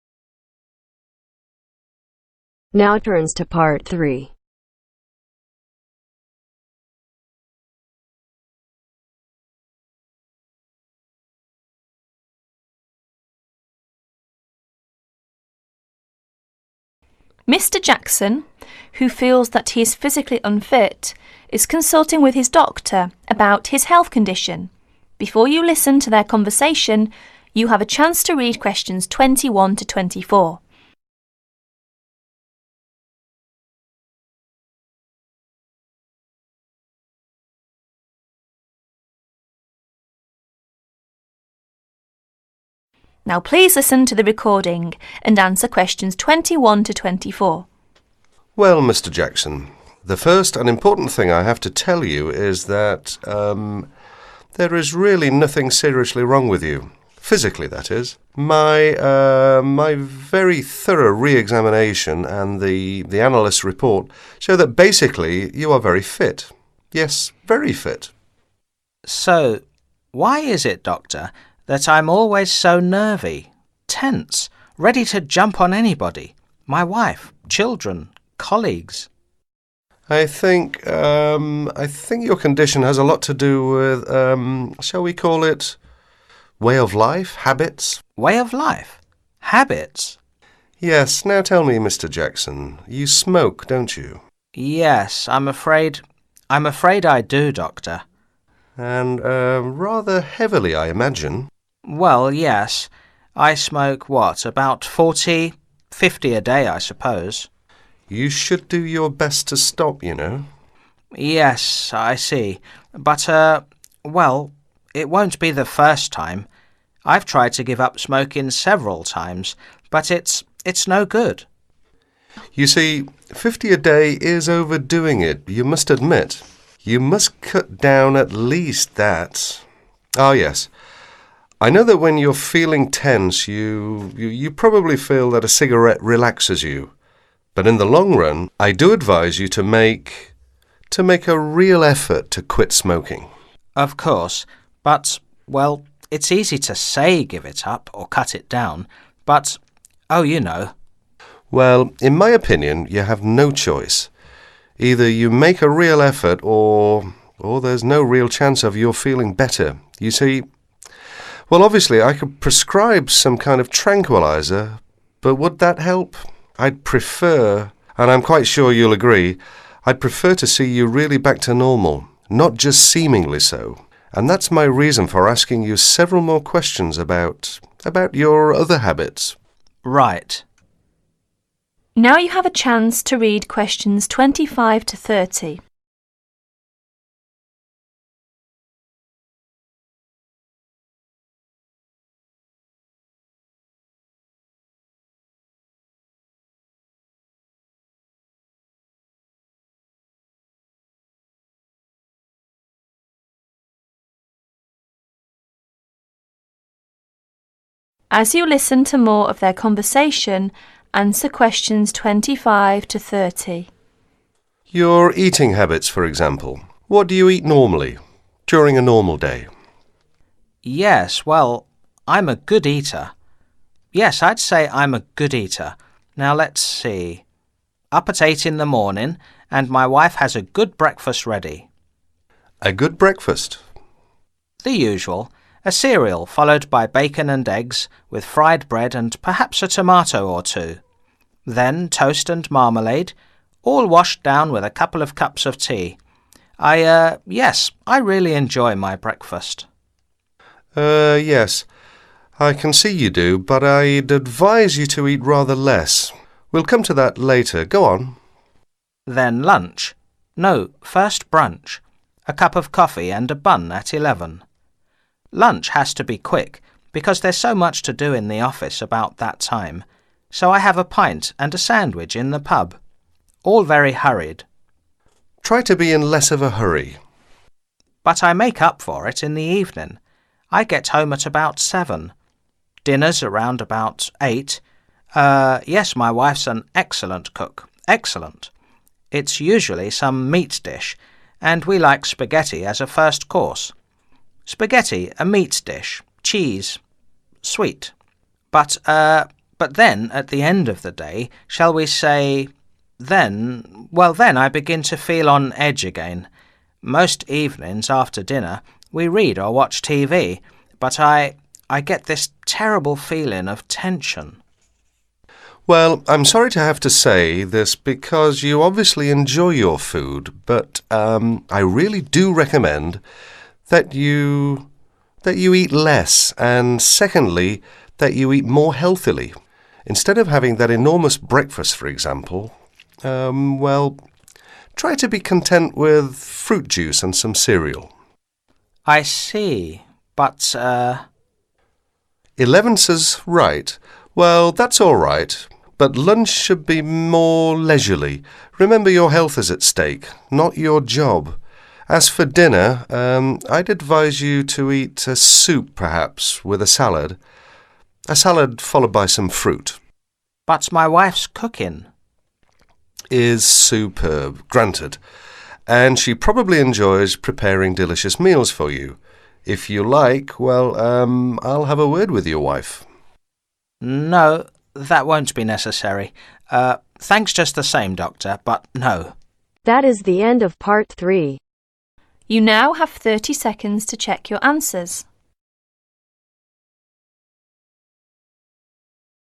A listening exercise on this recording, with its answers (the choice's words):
Choose the correct letter A-D.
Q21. After his re-examination. Dr. Lee reaches the conclusion that ________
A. Mr. Jackson is very sick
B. Mr. Jackson is basically fit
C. Mr. Jackson has a mental problem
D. Mr. Jackson has a lung problem because of oversmoking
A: Mr. Jackson is basically fit

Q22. Mr. Jackson is troubled by the fact that ________________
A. he always feels on edge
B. he is a very good eater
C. he smokes more than what is good for him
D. he drinks more than what is good for him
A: he always feels on edge

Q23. How many cigarettes does Mr. Jackson consume each day?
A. 15.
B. 40.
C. 50.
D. 14.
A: 50.

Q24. To make Mr. Jackson feel fit. Dr. Lee _________________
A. prescribes him some tranquilisers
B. advises him to make a real effort to quit smoking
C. Advices him to make a real effort to quit smoking at least.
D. Both B and C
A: Both B and C

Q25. a cereal, bacon and eggs, 25_______________, a tomato or two. toast and marma-lades. plus a couple of cups of tea.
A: Fried bread

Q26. FOR brunch. Mr. Jackson usually has a cup of coffee and 26_______________at eleven.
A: A bun

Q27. FOR lunch. Mr. Jackson usually has a pint and a sandwich In the 27________________ all very hurriedly.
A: Pub

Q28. FOR supper. Mr. Jackson usually has spaghetti and a meat dish, cheese and 28_________________.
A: sweet